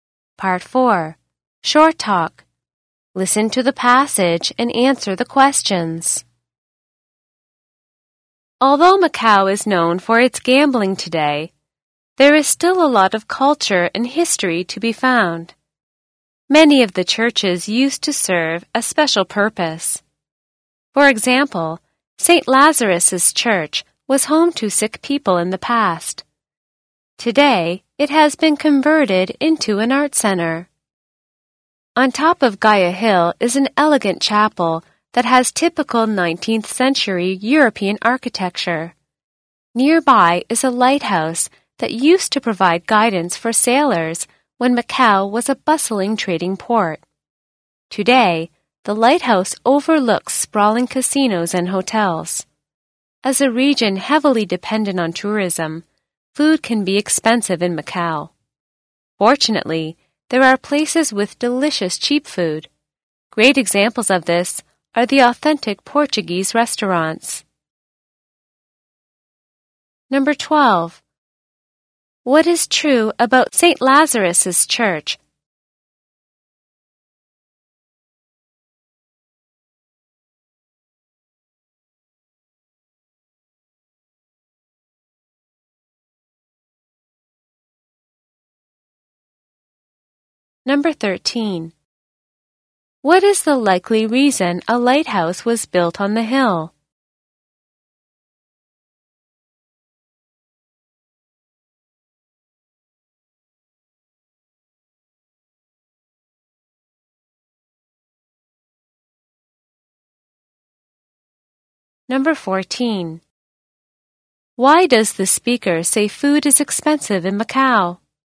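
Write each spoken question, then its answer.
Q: What is true about St.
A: It used to be home to sick people and is now an art center.

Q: What is the likely reason a lighthouse was built on the hill?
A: To guide sailors when Macau was a busy trading port.

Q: Why does the speaker say food is expensive in Macau?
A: Because Macau depends heavily on tourism.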